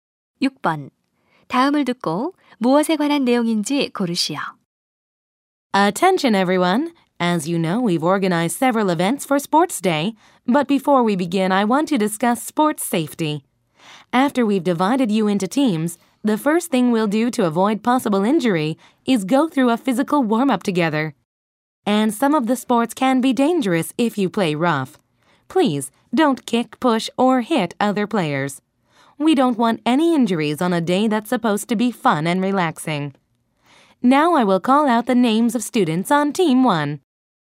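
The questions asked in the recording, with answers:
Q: 다음을 듣고 무엇에 관한 내용인지 고르시오.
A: 운동할 때의 안전 수칙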